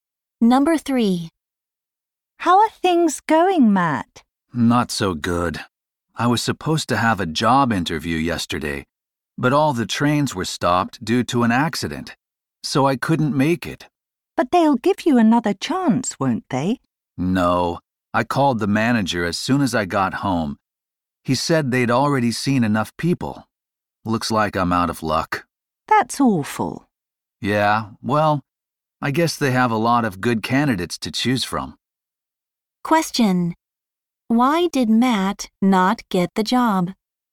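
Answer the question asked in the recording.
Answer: He missed the interview because the trains stopped, and the company had already seen enough people.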